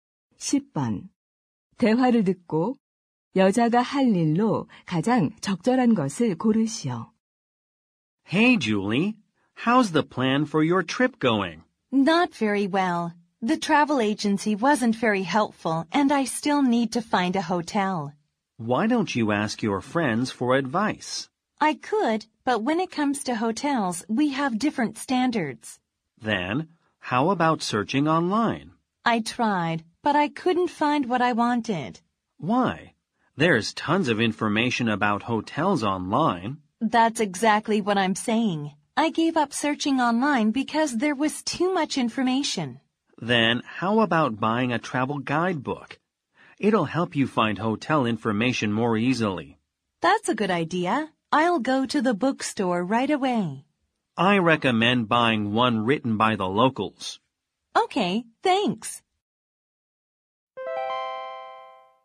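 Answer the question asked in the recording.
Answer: 서점에 가서 여행 안내서 사기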